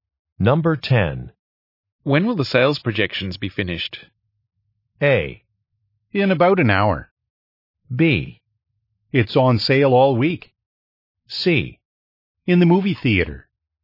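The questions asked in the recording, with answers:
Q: When will the sales projections be finished?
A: A: In about an hour.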